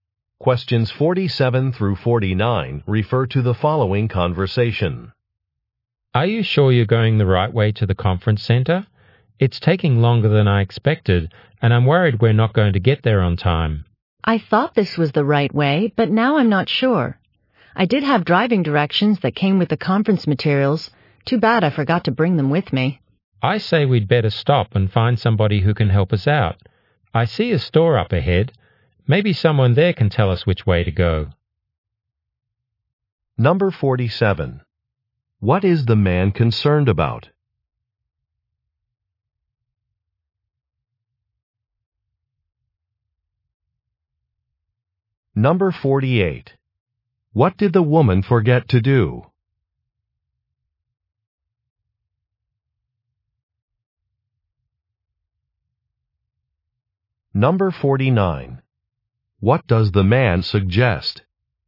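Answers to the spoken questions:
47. Arriving late at the conference
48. Bring the driving directions
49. Asking for directions at a store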